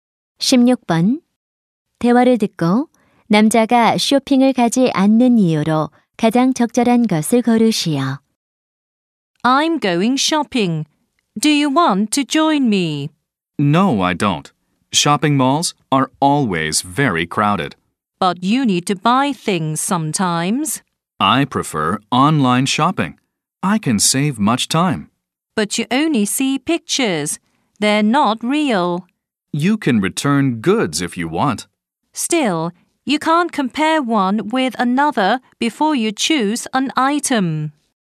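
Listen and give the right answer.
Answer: 쇼핑몰이 항상 붐벼서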